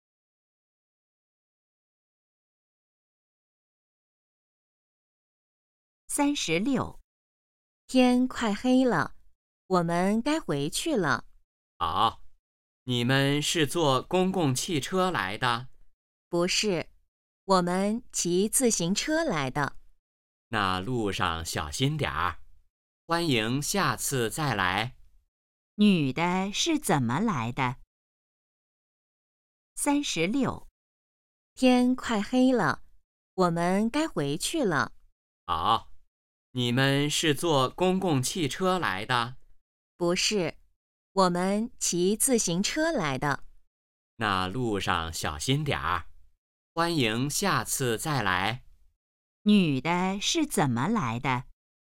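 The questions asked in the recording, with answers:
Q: 女的是怎么来的?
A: 骑自行车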